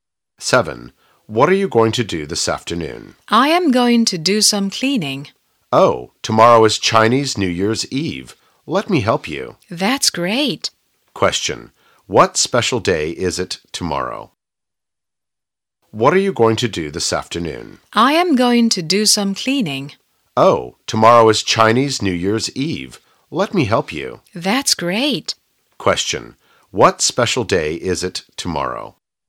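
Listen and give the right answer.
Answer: Chinese New Year's Eve.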